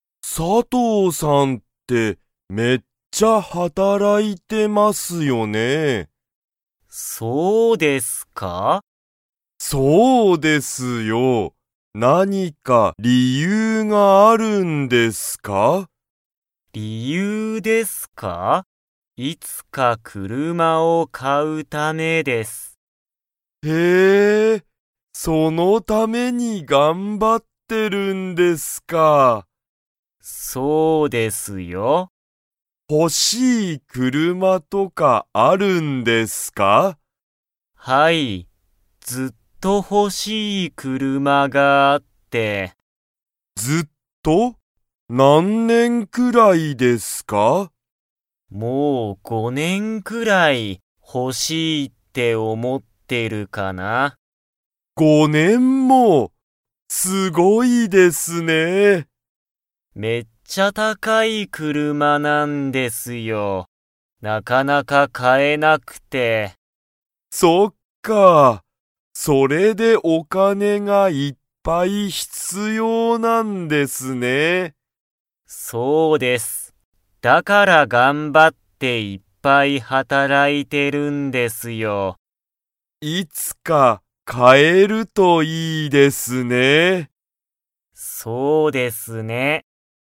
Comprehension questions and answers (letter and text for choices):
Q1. 佐藤(さとう)さんは、____くらい、その車(くるま)をほしいと思(おも)っている。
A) 5日(いつか)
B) 10日とおか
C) 5(ご)年(ねん)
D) 10じゅう年ねん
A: C) 5(ご)年(ねん)

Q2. 佐藤(さとう)さんは、今(いま)、その車(くるま)を買(か)いますか?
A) はい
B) いいえ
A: B) いいえ

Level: Level 2